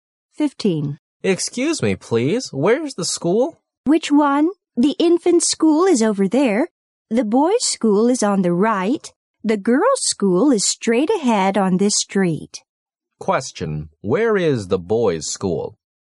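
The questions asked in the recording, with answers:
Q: where is the boys' school?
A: On the right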